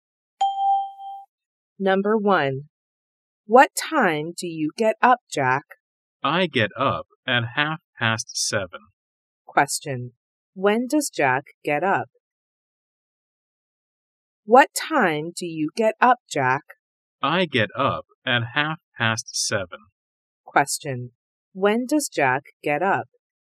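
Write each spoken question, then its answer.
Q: When does Jack get up?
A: At 7:30.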